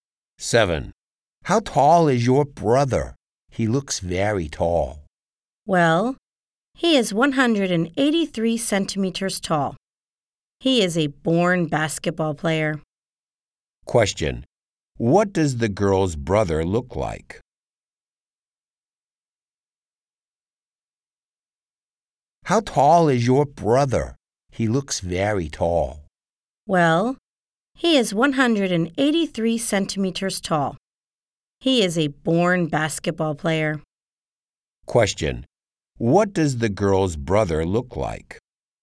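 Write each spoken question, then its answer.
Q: What does the girl's brother look like?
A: He is very tall (183 centimeters).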